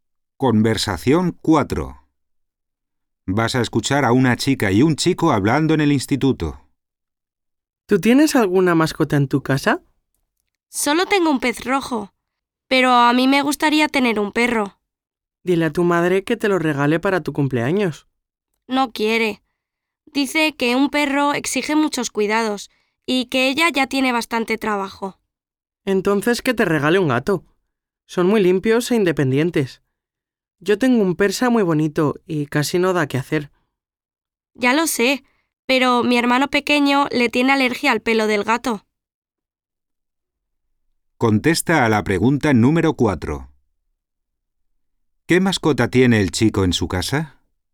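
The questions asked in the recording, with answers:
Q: ¿Qué mascota tiene el chico en su casa?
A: Un pez rojo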